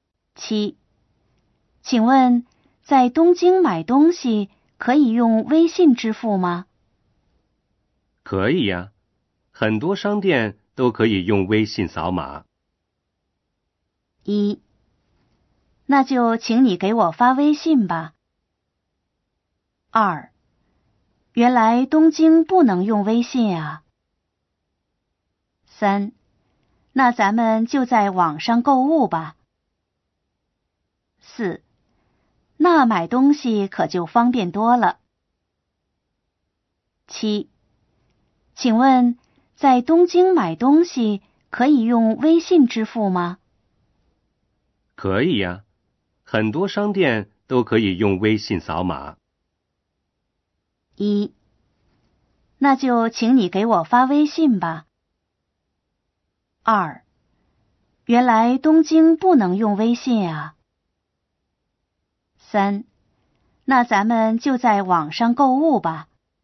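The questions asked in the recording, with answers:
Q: 可以呀,很多商店都可以用微信扫码。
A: 四: 那买东西可就方便多了。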